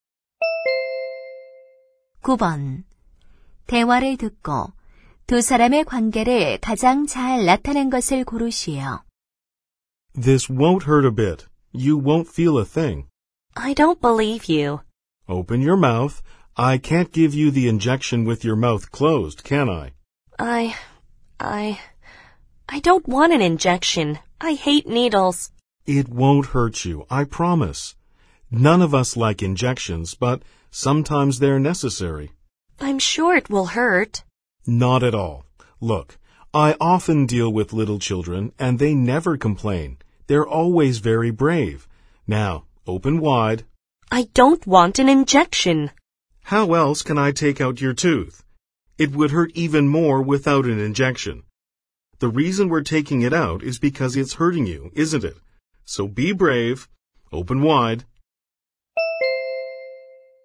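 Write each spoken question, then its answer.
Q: 대화를 듣고 두 사람의 관계를 가장 잘 나타낸 것을 고르시오.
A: 치과의사와 환자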